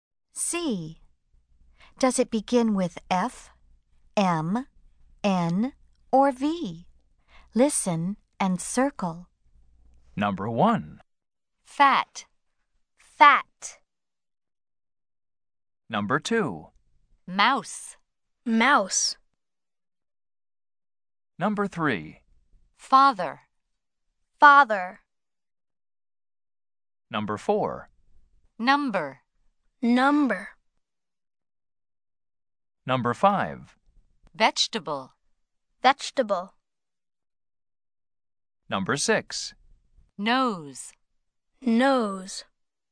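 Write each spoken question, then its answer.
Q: Does it begin with F, M, N, or V?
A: F (fat)

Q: Does it begin with F, M, N, or V?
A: M (mouse)

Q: Does it begin with F, M, N, or V?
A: F (father)

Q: Does it begin with F, M, N, or V?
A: N (number)

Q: Does it begin with F, M, N, or V?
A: V (vegetable)

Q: Does it begin with F, M, N, or V?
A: N (nose)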